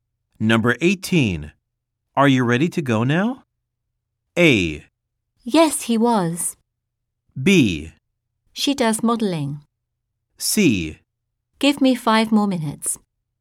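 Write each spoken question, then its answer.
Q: Are you ready to go now?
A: C: Give me 5 more minutes.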